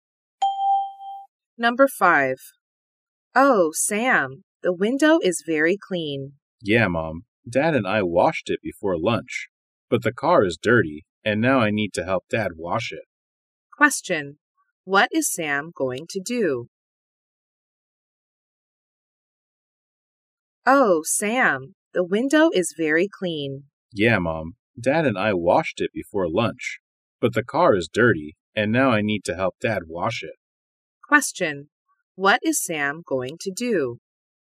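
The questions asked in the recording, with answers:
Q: What is Sam going to do?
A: Help his dad wash the car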